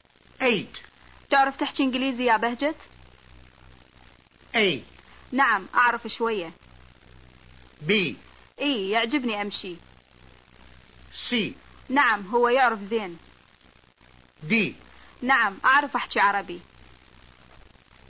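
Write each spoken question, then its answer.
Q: تعرف تحكي إنجليزي يا بهجت؟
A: A: نعم أعرف شوية.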